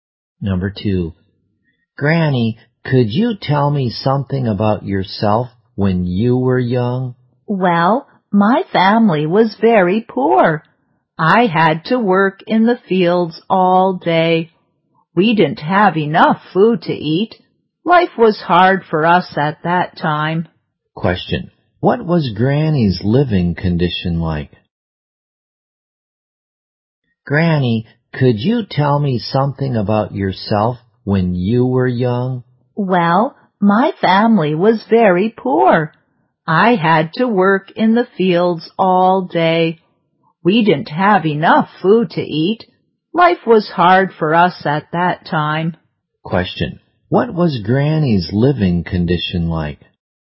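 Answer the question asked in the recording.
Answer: Poor and hard.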